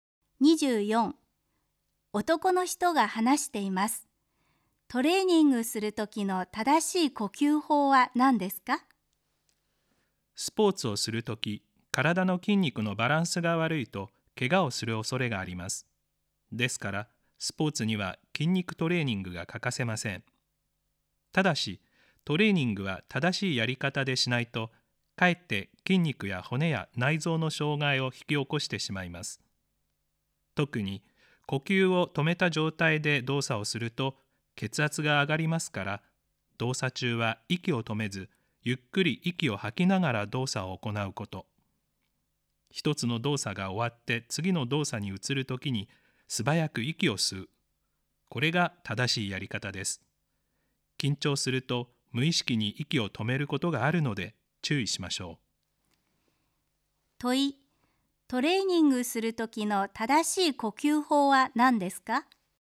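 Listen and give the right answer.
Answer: 動作中は息を止めずゆっくり吐き、次の動作に移るときに素早く吸う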